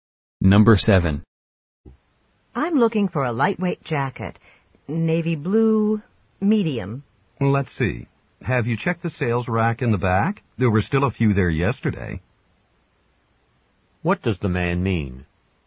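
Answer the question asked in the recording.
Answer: The woman should check the sales rack in the back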